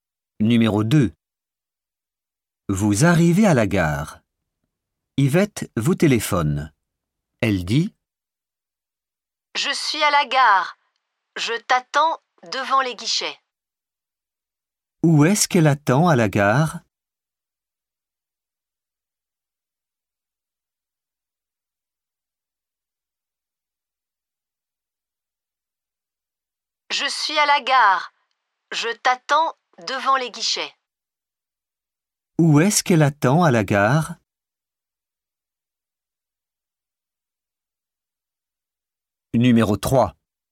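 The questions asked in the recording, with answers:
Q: Où est-ce qu'elle attend à la gare?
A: Devant les guichets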